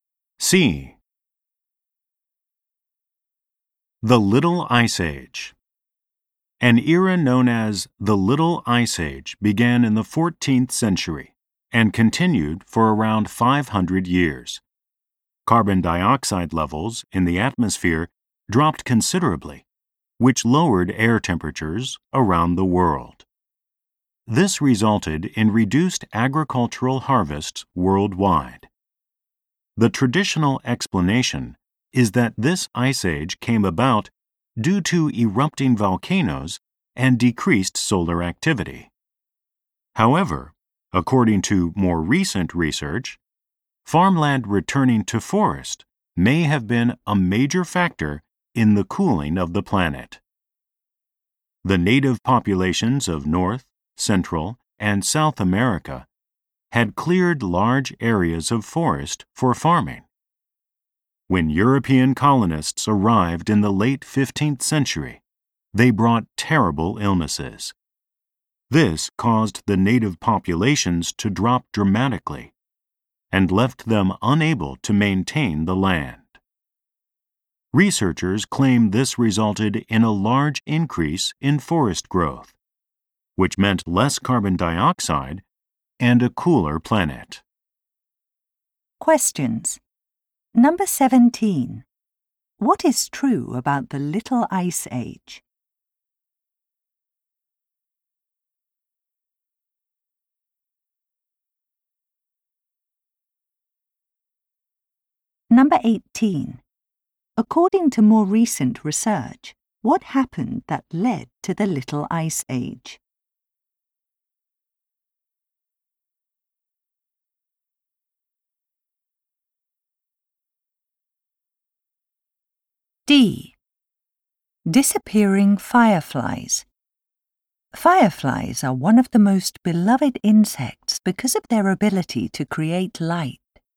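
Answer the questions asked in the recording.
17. It reduced agricultural harvests worldwide
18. Farmland returned to forest after native populations dropped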